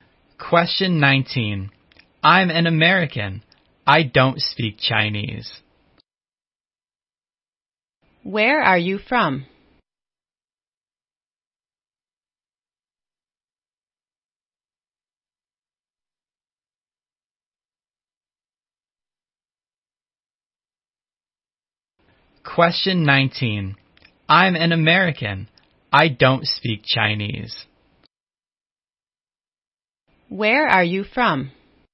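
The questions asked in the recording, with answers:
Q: Where are you from?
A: America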